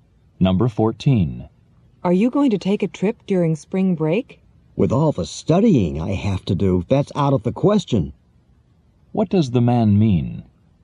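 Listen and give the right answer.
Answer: He can't take a trip because he must study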